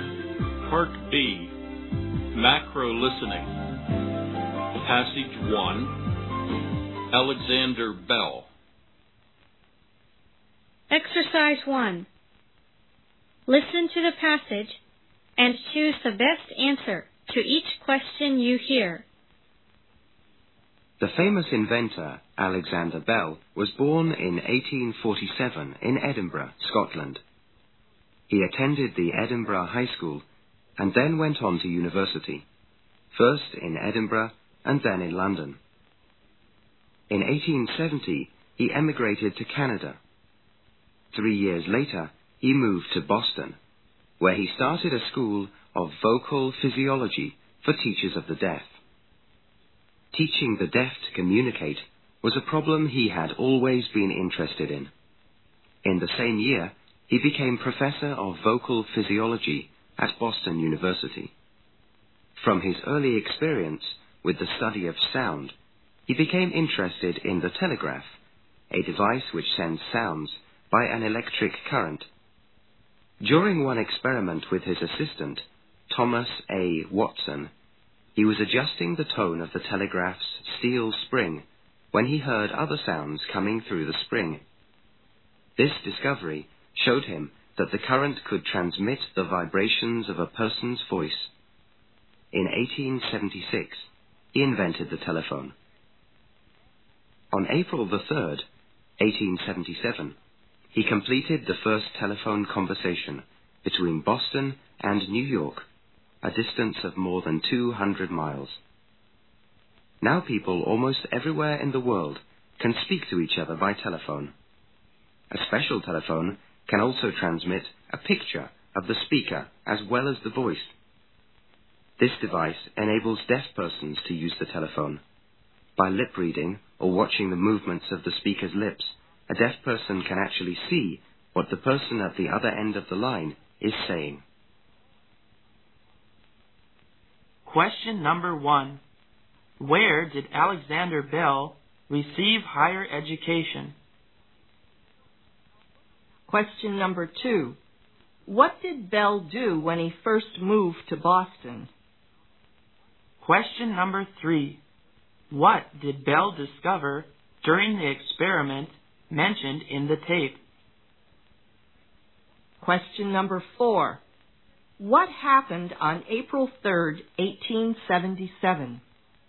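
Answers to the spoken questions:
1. In Edinburgh and then in London
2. He started a school of vocal physiology for teachers of the deaf
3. That the current could transmit the vibrations of a person's voice
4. The first telephone conversation between Boston and New York was completed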